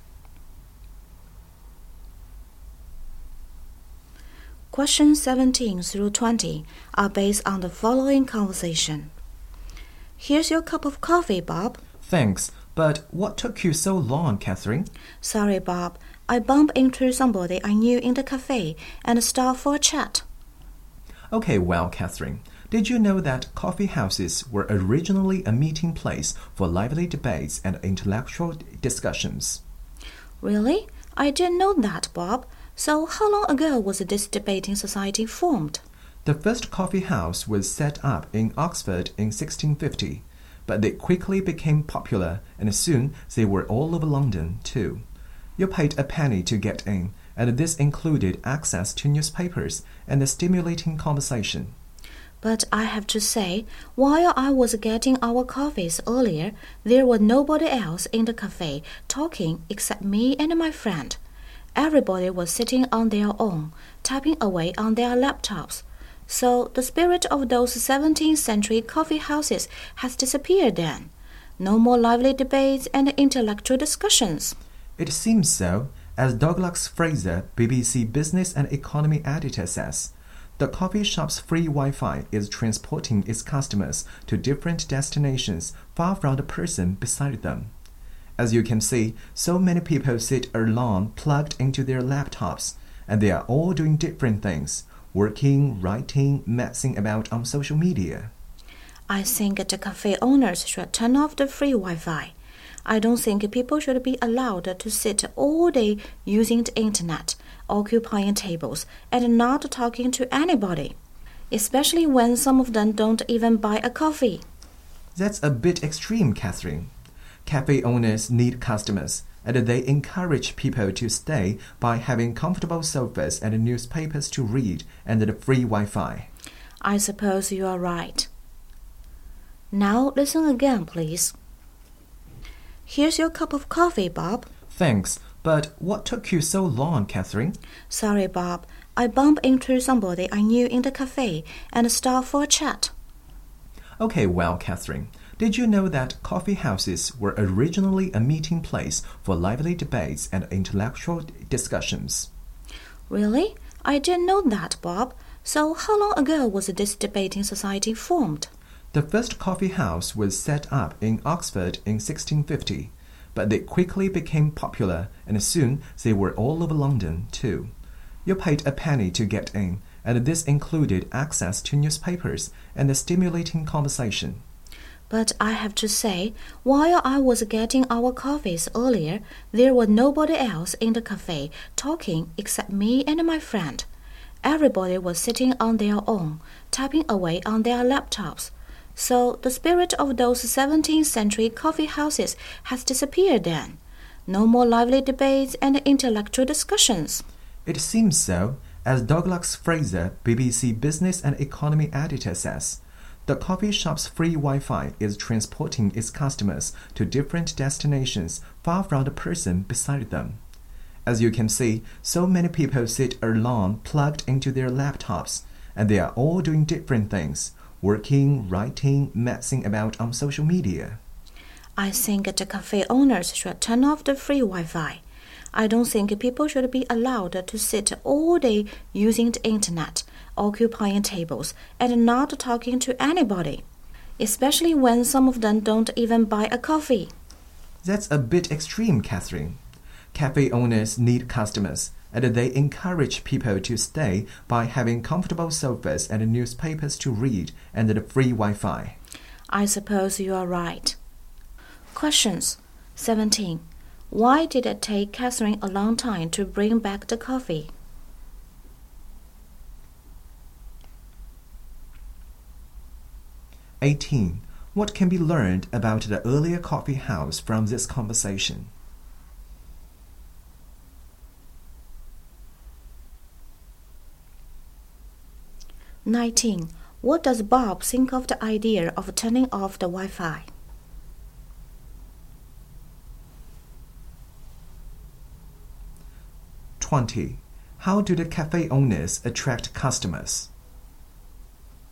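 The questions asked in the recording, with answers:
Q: Why did it take Catherine a long time to bring back the coffee?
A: She stopped to chat with someone she knew

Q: What can be learned about the earlier coffee house from this conversation?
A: It was a place for lively debates and intellectual discussions

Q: What does Bob think of the idea of turning off the Wi-Fi?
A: It is a bit extreme

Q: How do the cafe owners attract customers?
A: Comfortable sofas, newspapers and free Wi-Fi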